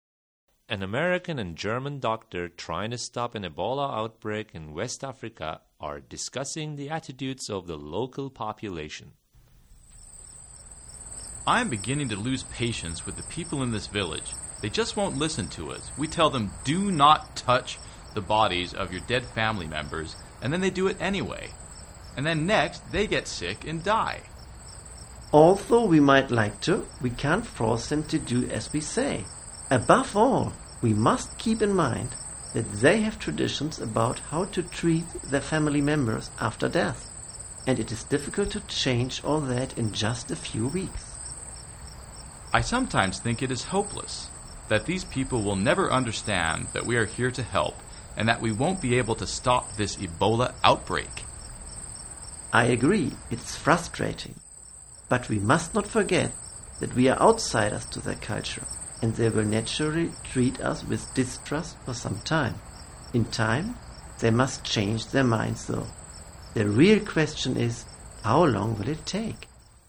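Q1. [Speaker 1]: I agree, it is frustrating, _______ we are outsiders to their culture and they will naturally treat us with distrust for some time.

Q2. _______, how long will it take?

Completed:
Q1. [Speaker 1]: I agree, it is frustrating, but we must not forget that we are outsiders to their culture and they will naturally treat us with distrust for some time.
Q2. The real question is, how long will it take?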